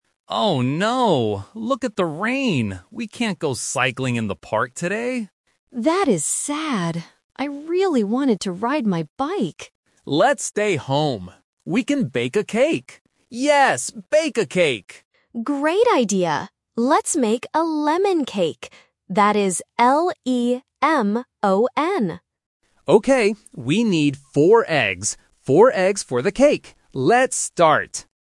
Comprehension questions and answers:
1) What did they want to do first?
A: Go cycling

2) What kind of cake will they make?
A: Lemon

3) How many eggs do they need?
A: Four